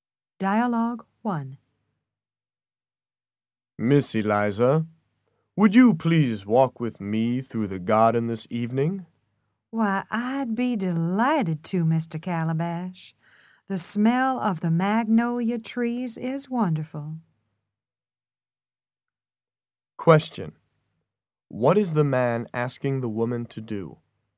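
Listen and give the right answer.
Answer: To walk with him through the garden this evening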